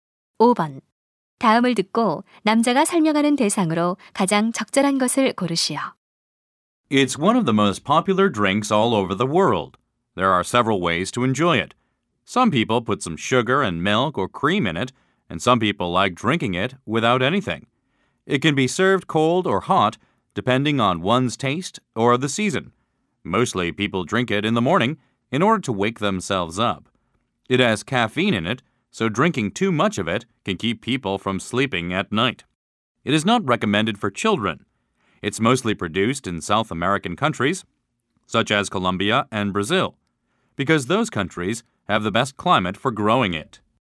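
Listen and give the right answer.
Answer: 커피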